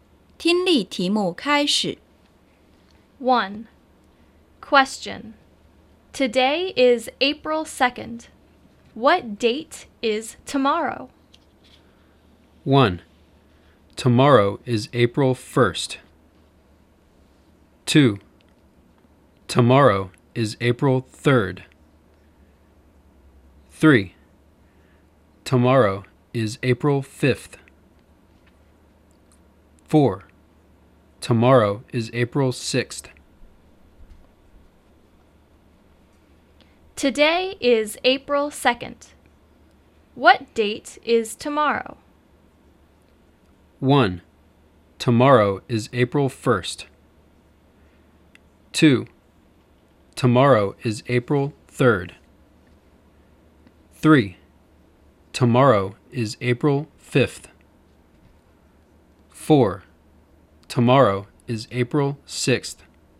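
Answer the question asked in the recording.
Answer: 2: Tomorrow is April 3rd.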